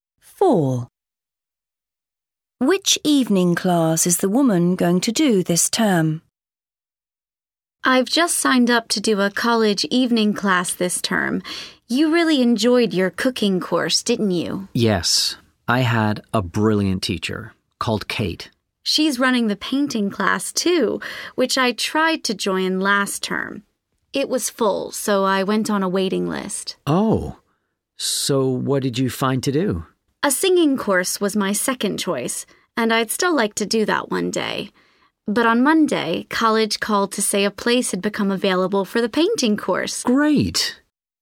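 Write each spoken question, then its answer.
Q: Which evening class is the woman going to do this term?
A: painting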